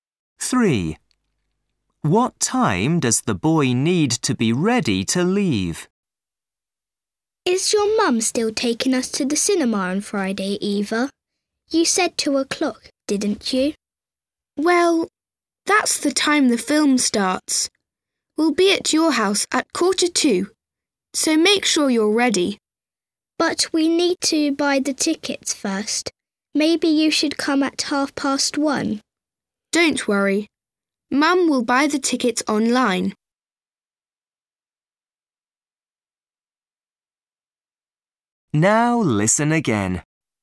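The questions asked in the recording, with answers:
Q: What time does the boy need to be ready to leave?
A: 1:45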